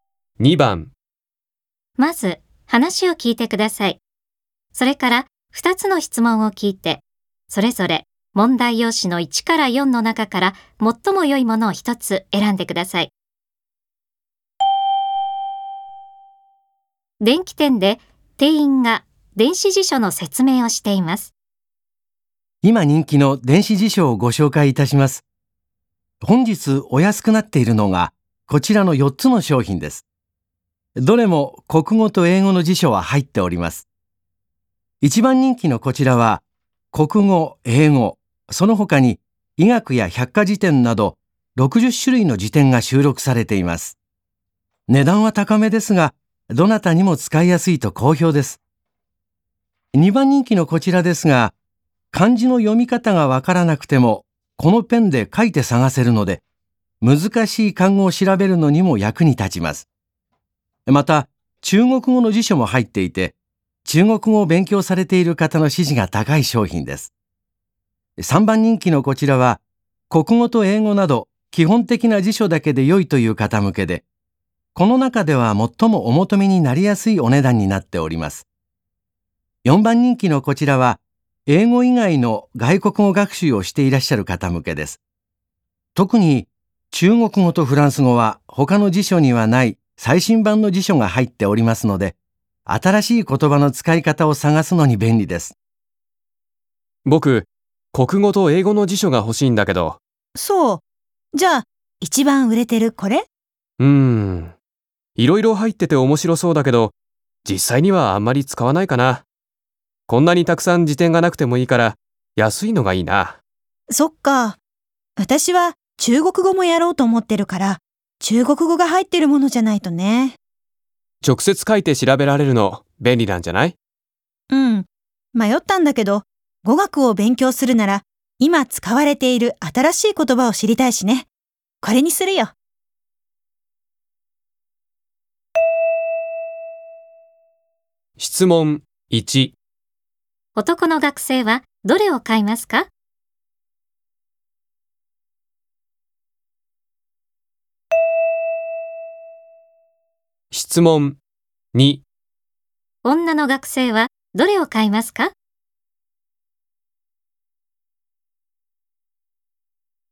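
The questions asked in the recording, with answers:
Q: 男の学生はどれを買いますか?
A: 3番人気の、基本的な辞書だけの一番安い電子辞書

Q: 女の学生はどれを買いますか?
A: 4番人気の、最新版の中国語とフランス語の辞書が入った電子辞書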